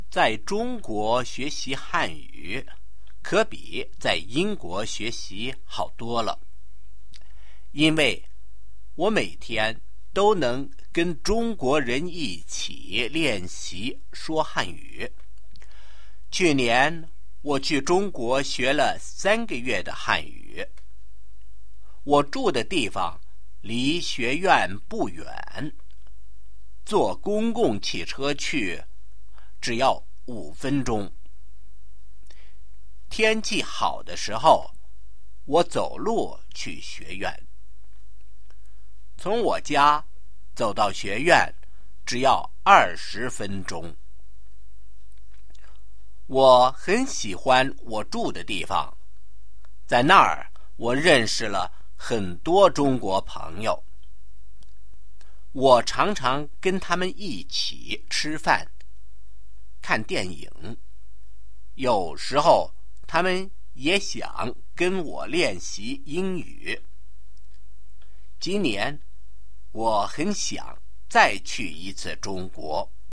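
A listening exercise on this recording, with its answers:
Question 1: Why is it better to learn Chinese in China than it is in the UK?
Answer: Because I can practise speaking Chinese with Chinese people every day.

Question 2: How long did I spend in China last year?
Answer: 3 months

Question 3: How far is it from my place to the college?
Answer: Not far: 5 minutes by bus, 20 minutes on foot.

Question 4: When did I walk to the college?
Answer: When the weather was good.

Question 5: What did I do with my Chinese friends?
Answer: Ate meals and watched films together; sometimes they practised English with me.

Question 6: Did I like my China trip? Why?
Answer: Yes; I liked where I lived, made many Chinese friends, and want to go again this year.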